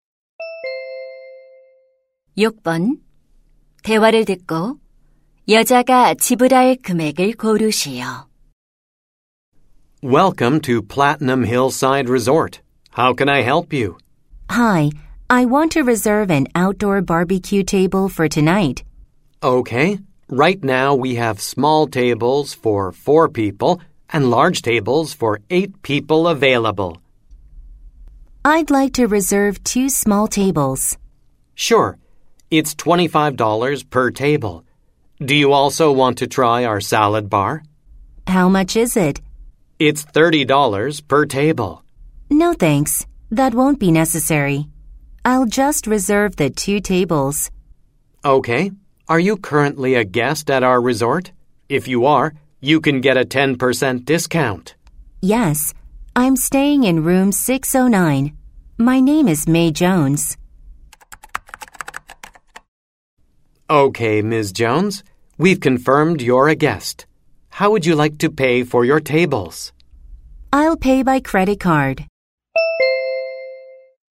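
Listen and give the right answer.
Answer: $45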